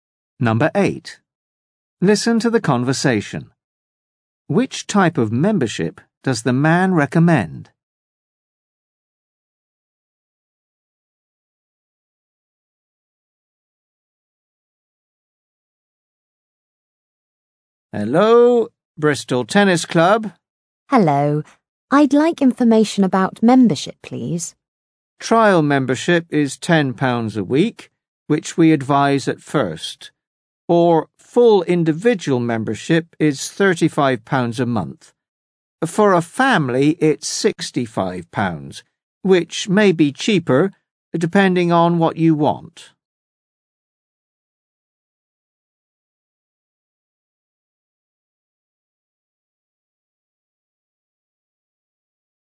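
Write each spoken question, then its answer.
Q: Which type of membership does the man recommend?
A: Trial membership.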